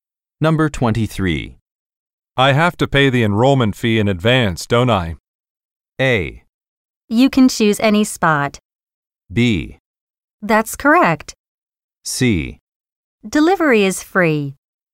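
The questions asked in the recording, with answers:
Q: I have to pay the enrollment fee in advance, don't I?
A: B: That's correct.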